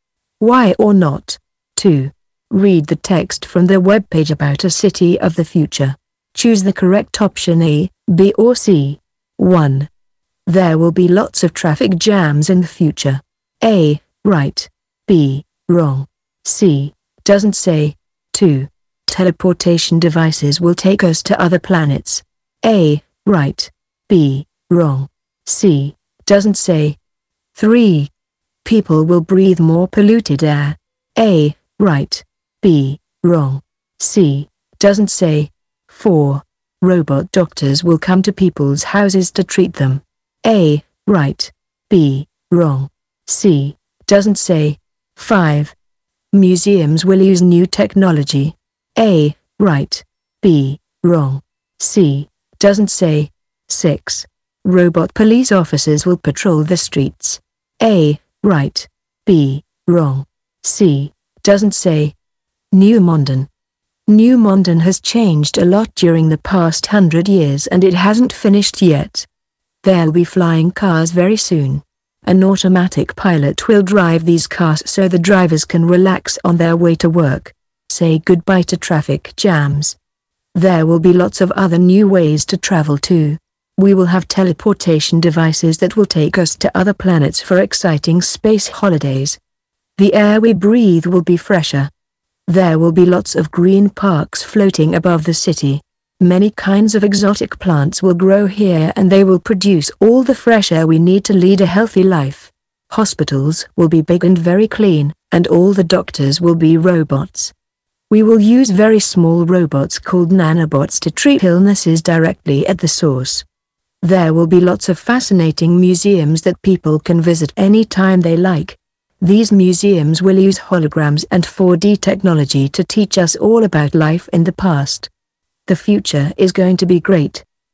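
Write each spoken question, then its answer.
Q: There will be lots of traffic jams in the future.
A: B: Wrong

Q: Teleportation devices will take us to other planets.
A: A: Right

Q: People will breathe more polluted air.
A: B: Wrong

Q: Museums will use new technology.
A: A: Right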